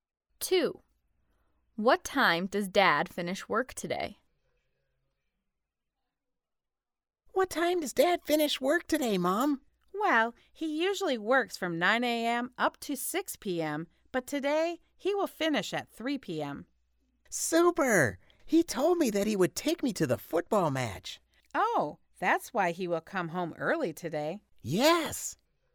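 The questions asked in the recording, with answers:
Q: What time does Dad finish work today?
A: 3 p.m.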